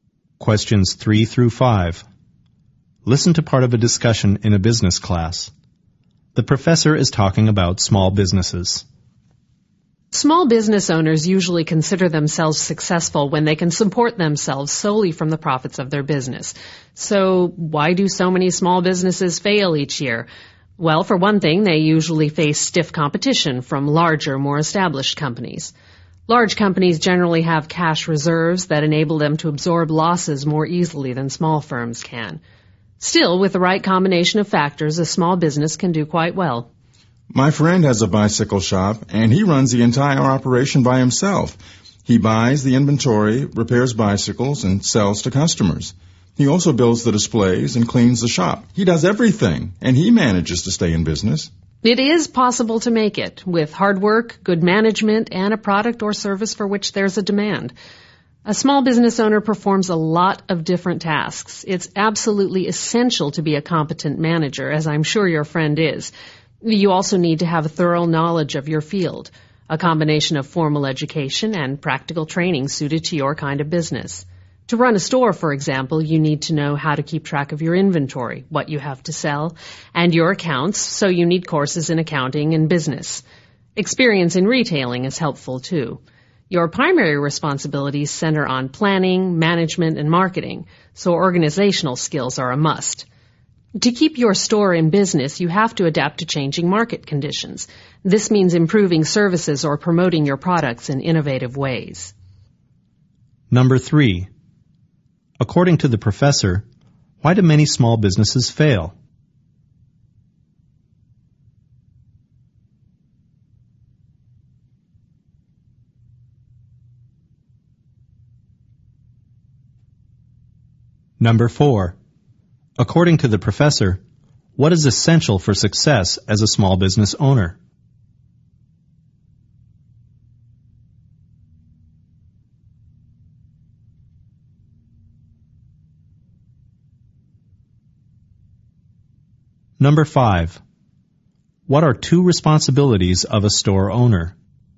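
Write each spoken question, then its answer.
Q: According to the professor, why do many small businesses fail?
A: They face stiff competition from larger, established companies with cash reserves

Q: According to the professor, what is essential for success as a small business owner?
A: Being a competent manager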